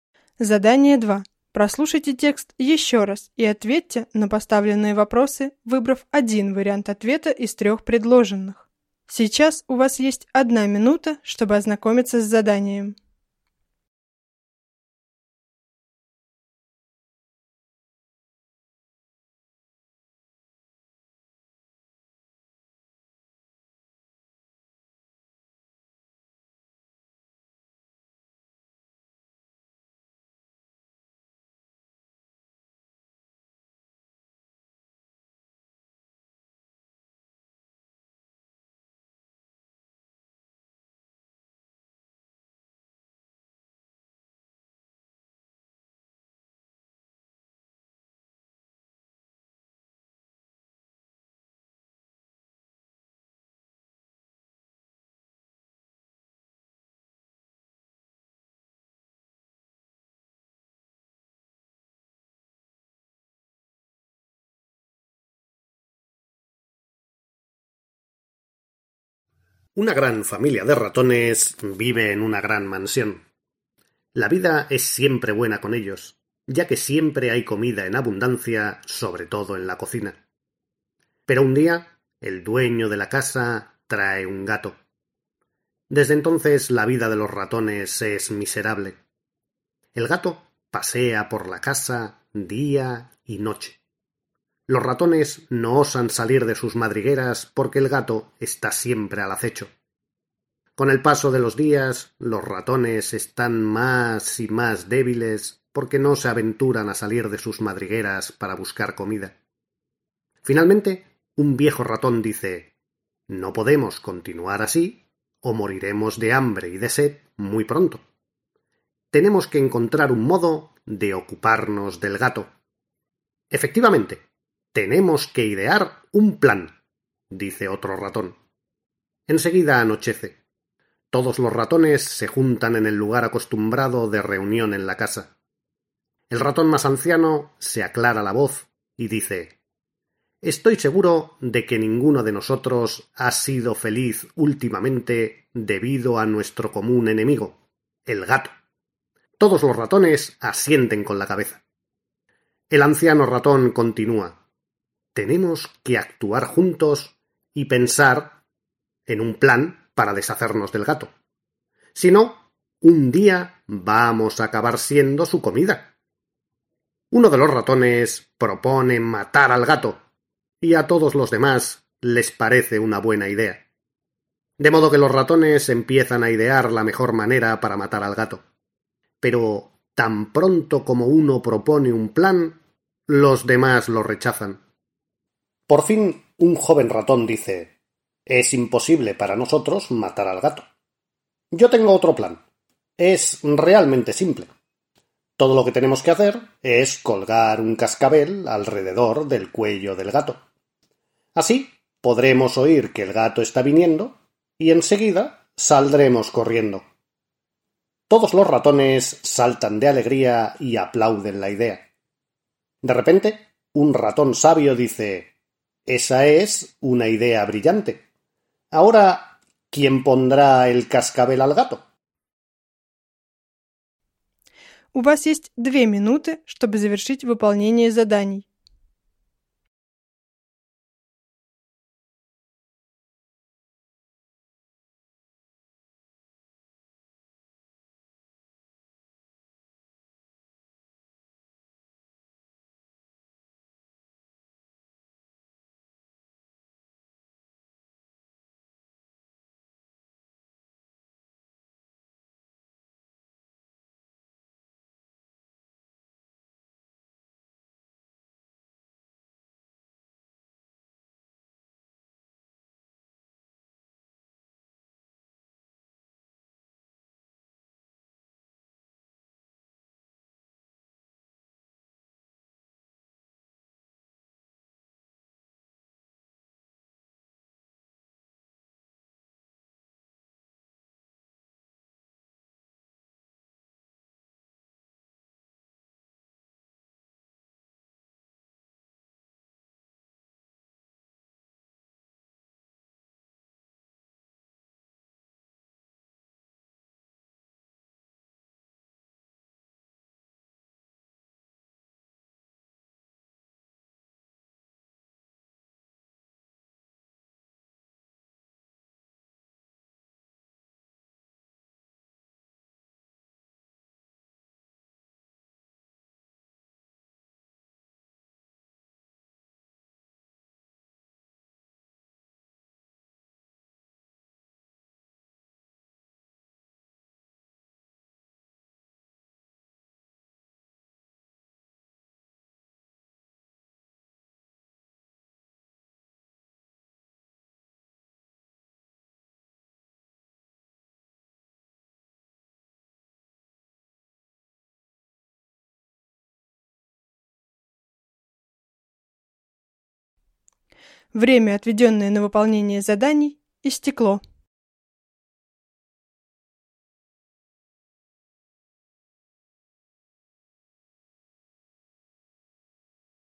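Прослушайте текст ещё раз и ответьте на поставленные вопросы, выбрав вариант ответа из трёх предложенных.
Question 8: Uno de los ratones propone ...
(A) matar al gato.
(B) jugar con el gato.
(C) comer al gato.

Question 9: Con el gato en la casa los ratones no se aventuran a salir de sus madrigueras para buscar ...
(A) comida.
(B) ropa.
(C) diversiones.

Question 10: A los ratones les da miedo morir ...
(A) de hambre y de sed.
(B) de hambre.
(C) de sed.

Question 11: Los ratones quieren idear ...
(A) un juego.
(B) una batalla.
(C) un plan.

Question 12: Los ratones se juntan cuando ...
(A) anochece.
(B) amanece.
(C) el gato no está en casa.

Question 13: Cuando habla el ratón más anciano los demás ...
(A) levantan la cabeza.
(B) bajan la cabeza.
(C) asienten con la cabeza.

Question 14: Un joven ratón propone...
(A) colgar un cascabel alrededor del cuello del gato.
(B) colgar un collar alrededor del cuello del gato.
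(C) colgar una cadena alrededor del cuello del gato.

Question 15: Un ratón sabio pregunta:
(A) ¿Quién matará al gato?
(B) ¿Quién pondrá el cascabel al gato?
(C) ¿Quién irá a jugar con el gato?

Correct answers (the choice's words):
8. matar al gato.
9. comida.
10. de hambre y de sed.
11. un plan.
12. anochece.
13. asienten con la cabeza.
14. colgar un cascabel alrededor del cuello del gato.
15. ¿Quién pondrá el cascabel al gato?

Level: 4-5 класс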